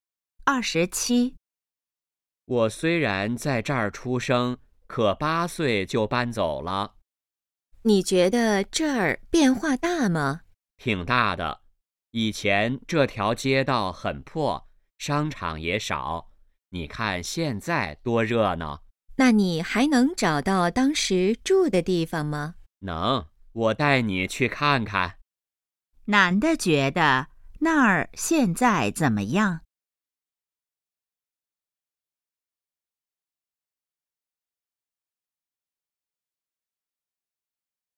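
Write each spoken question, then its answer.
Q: 男的觉得那儿现在怎么样?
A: 很热闹,变化大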